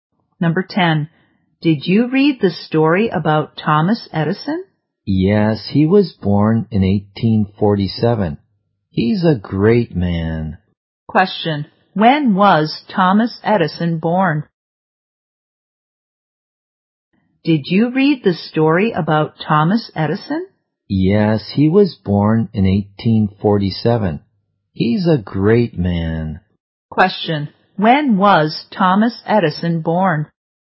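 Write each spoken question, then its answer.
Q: Question. When was Thomas Edison born?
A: In 1847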